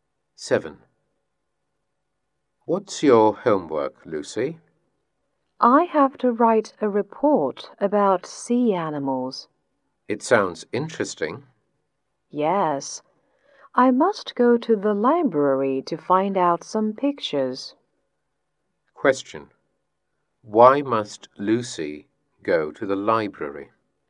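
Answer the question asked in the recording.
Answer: To find some pictures for her report about sea animals.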